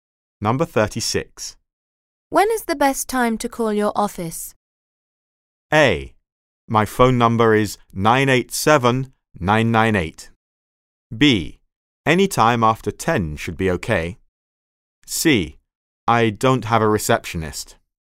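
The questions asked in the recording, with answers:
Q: When is the best time to call your office?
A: B: Any time after 10 should be okay.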